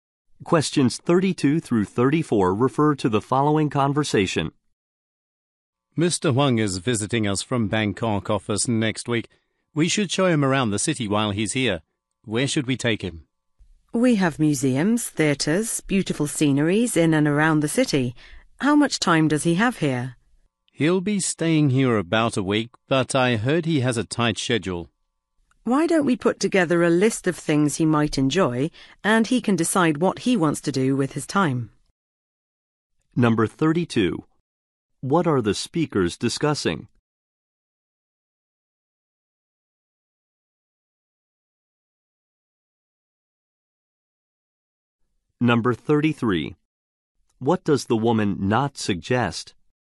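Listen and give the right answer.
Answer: Showing visiting Mr. Huang around the city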